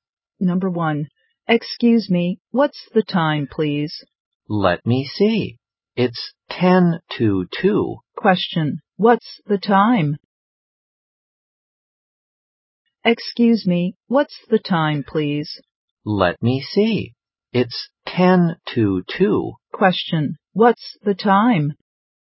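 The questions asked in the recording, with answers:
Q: Question, what's the time?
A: 1:50 (ten to two)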